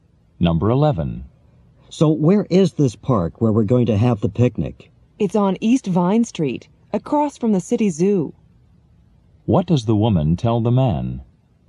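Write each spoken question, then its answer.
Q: What does the woman tell the man?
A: The park is on East Vine Street across from the zoo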